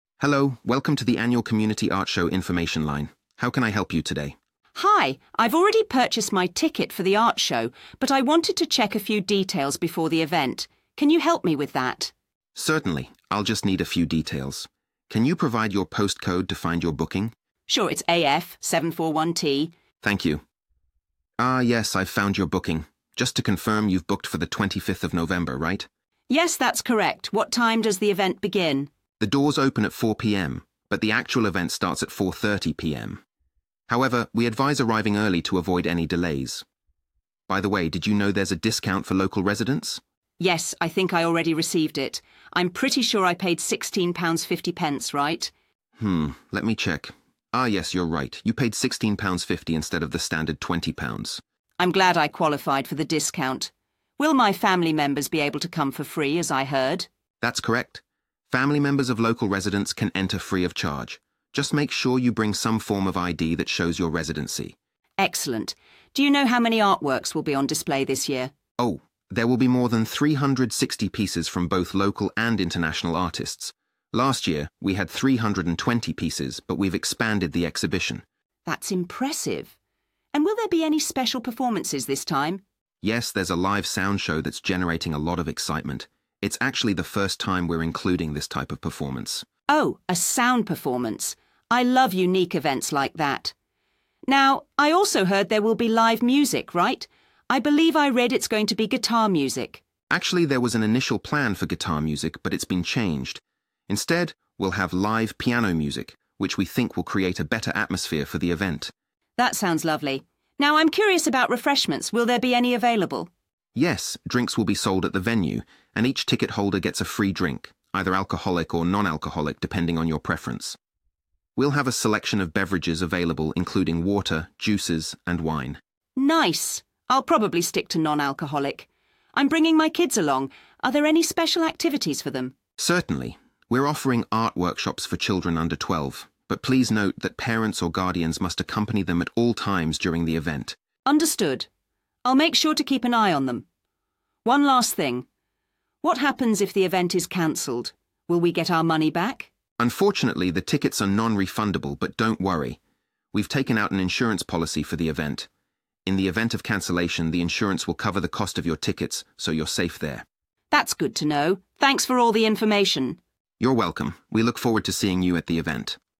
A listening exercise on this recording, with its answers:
Complete the form below. Write ONE WORD AND/OR A NUMBER for each answer.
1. Postcode: 1._____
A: AF741T

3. Discounted Ticket (for residents): £3._____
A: 16.50

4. Free entry for 4. _____members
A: family

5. Over 5. _____artworks on display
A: 360

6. Special live performances include a 6. _____show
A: sound

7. Live 7. _____music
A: piano

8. Refreshments will be available for purchase, including a free 8. _____with each ticket.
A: drink

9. available for children under 12 (accompanied by 9._____ )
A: parents

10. non-refundable but covered by 10. _____in case of event cancellation.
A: insurance